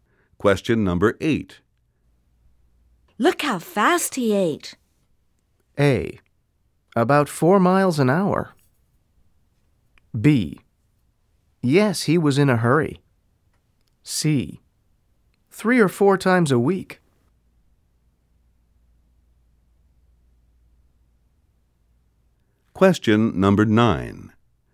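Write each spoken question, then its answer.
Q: Look how fast he ate.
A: B: Yes, he was in a hurry.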